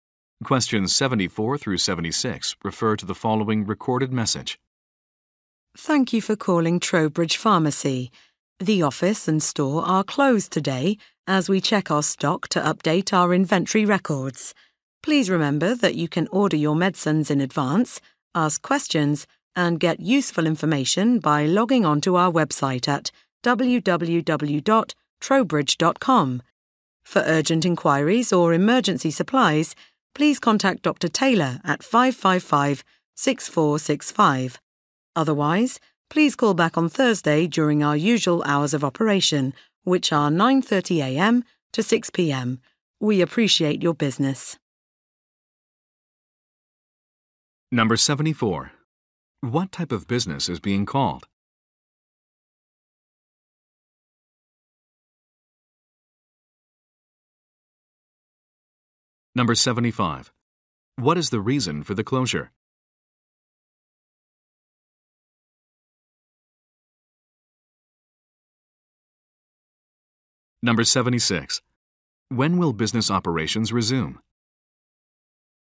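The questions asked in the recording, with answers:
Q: What type of business is being called?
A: A pharmacy

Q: What is the reason for the closure?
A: To check stock and update inventory

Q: When will business operations resume?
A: On Thursday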